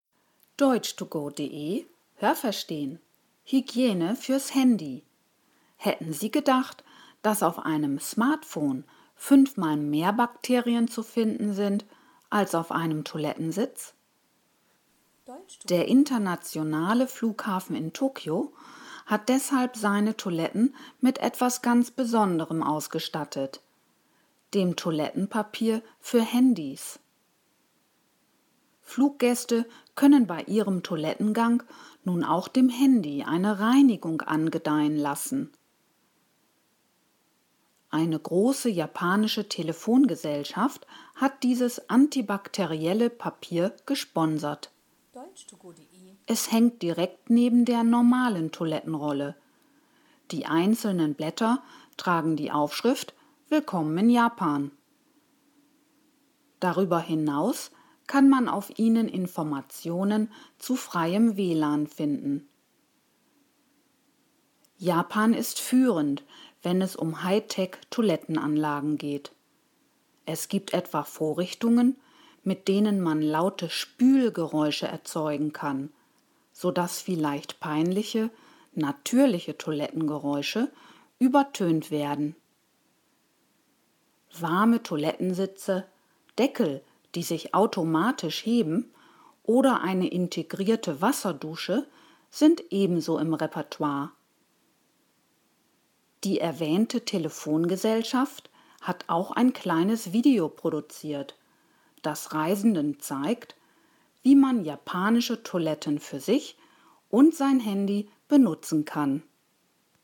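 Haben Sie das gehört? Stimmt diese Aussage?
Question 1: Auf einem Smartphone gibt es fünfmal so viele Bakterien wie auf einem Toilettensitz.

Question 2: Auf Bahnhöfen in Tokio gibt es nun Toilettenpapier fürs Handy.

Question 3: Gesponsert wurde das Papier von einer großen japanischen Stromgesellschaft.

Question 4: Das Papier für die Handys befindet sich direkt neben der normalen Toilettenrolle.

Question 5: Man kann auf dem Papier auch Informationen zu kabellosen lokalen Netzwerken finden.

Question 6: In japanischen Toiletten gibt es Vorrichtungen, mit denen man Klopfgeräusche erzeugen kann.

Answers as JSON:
{"1": "Ja, das habe ich gehört.", "2": "Nein, das habe ich nicht gehört.", "3": "Nein, das habe ich nicht gehört.", "4": "Ja, das habe ich gehört.", "5": "Ja, das habe ich gehört.", "6": "Nein, das habe ich nicht gehört."}

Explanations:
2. Der internationale Flughafen Tokios hat dies eingeführt.
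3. Es wurde von einer Telefongesellschaft gesponsert.
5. Im Deutschen als WLAN bezeichnet; international: Wi-Fi

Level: B1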